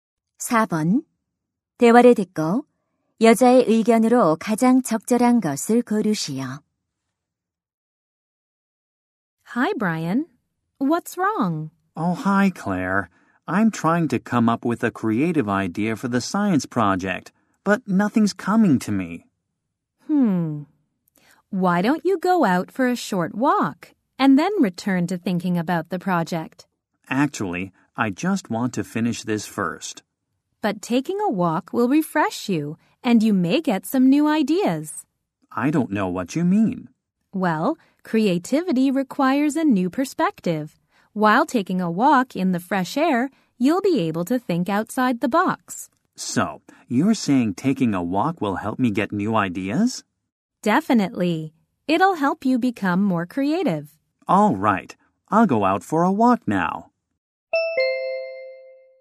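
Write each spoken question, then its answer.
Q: 대화를 듣고 여자의 의견으로 가장 적절한 것을 고르시오.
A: 산책은 창의적인 아이디어를 얻는 데 도움이 된다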